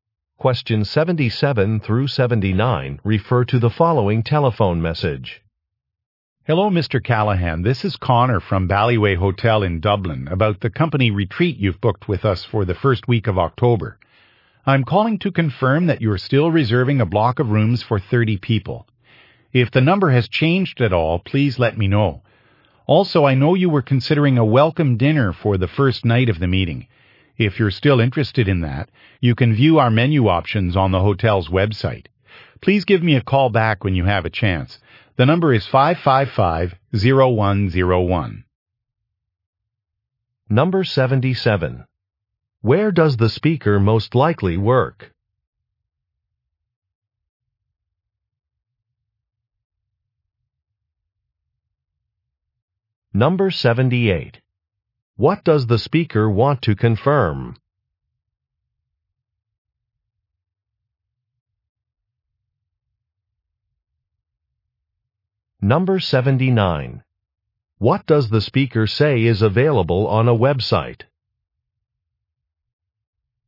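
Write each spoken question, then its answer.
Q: Where does the speaker most likely work?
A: At a hotel

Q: What does the speaker want to confirm?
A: The number of rooms reserved (for 30 people)

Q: What does the speaker say is available on a website?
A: Menu options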